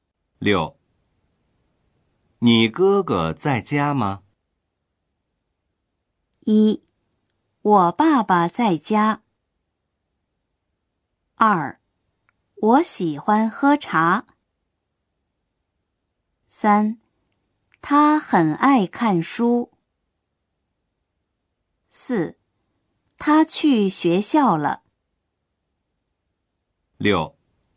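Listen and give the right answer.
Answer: 4: 他去学校了。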